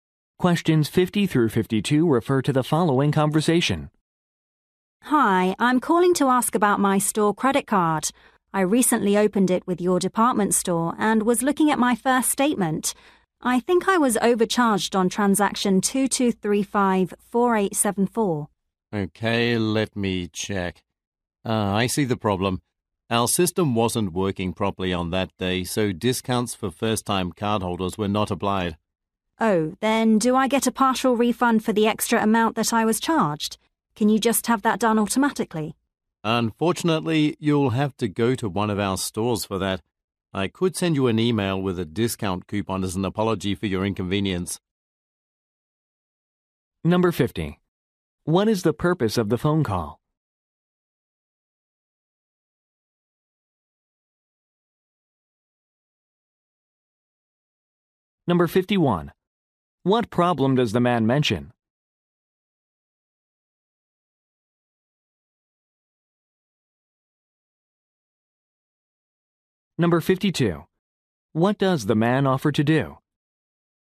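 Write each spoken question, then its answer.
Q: What is the purpose of the phone call?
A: To report an overcharge on a credit card statement

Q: What problem does the man mention?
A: The system malfunctioned so a discount wasn't applied

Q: What does the man offer to do?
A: Email a discount coupon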